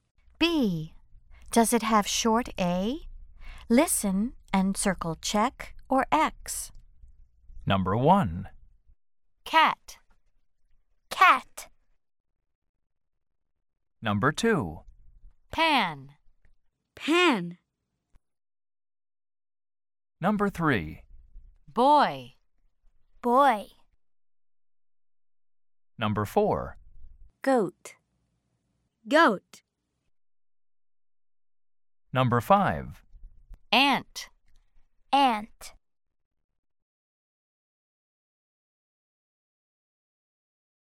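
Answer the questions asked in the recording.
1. Yes (check)
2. Yes (check)
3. No (X)
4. No (X)
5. Yes (check)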